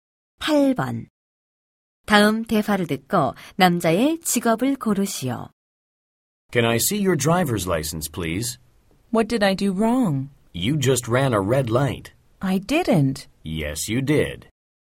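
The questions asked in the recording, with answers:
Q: 다음 대화를 듣고 남자의 직업을 고르시오.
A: 경찰관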